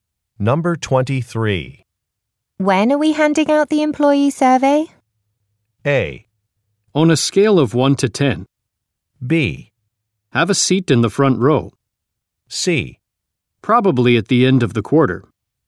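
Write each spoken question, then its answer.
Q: When are we handing out the employee survey?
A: C: Probably at the end of the quarter.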